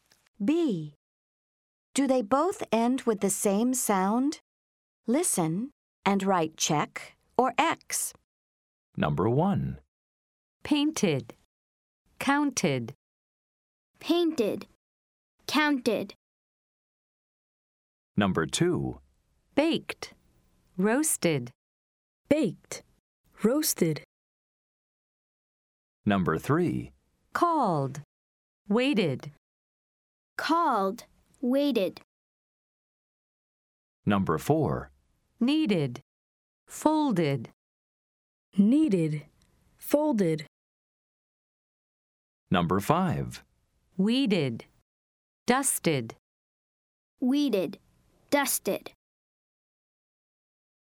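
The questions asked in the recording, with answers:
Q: Do they both end with the same sound?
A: Yes (check)

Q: Do they both end with the same sound?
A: No (X)

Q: Do they both end with the same sound?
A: No (X)

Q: Do they both end with the same sound?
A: Yes (check)

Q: Do they both end with the same sound?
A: Yes (check)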